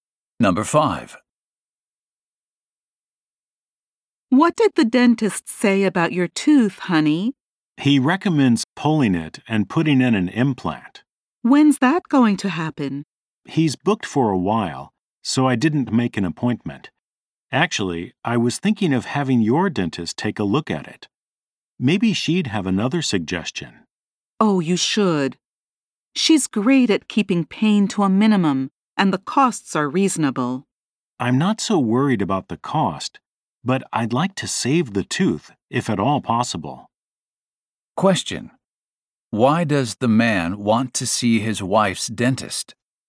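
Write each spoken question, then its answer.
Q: Why does the man want to see his wife's dentist?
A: He hopes to save the tooth instead of having it pulled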